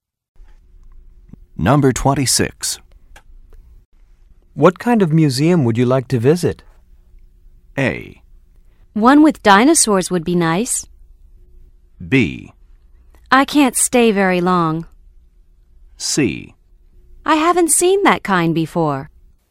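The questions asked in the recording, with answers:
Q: What kind of museum would you like to visit?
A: A: One with dinosaurs would be nice.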